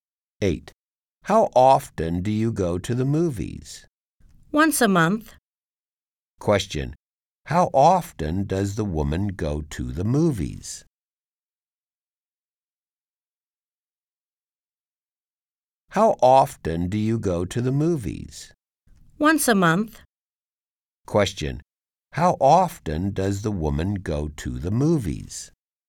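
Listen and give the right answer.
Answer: Once a month.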